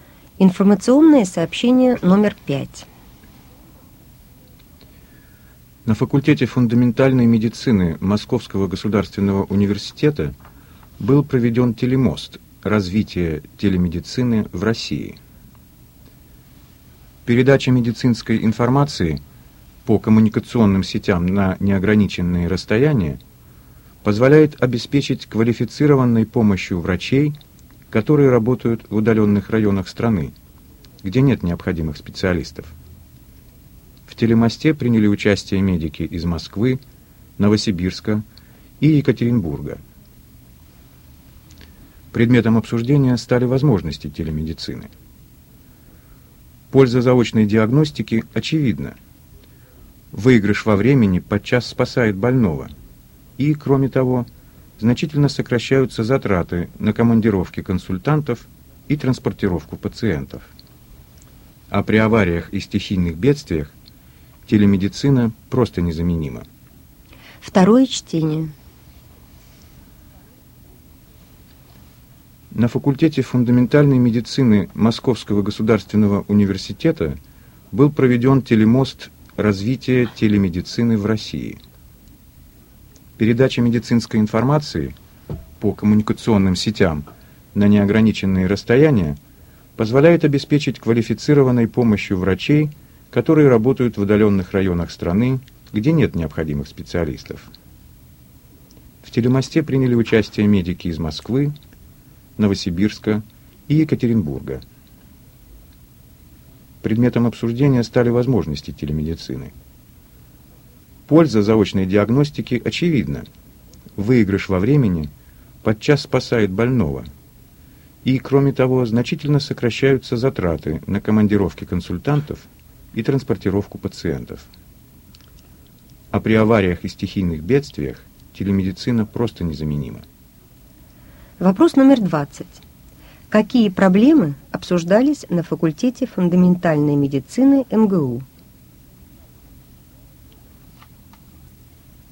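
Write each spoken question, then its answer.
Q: Какие проблемы обсуждались на факультете фундаментальной медицины МГУ?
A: Возможности телемедицины (развитие телемедицины в России)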